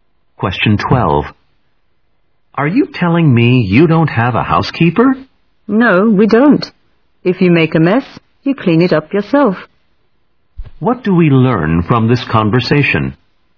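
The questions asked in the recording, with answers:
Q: What do we learn from this conversation?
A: They have no housekeeper; everyone cleans up their own mess.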